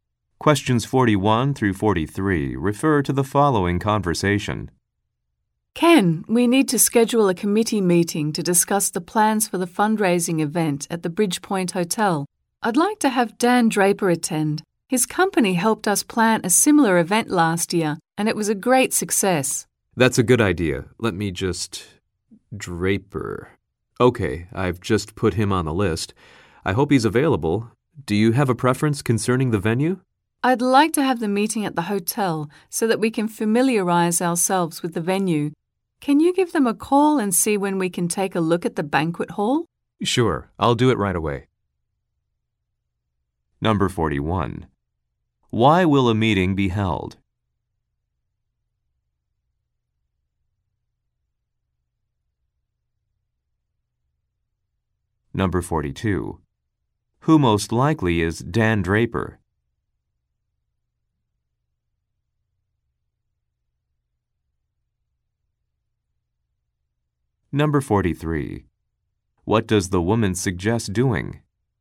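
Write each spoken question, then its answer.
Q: Why will a meeting be held?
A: To discuss plans for a fundraising event

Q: Who most likely is Dan Draper?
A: An event planner

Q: What does the woman suggest doing?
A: Holding the meeting at the hotel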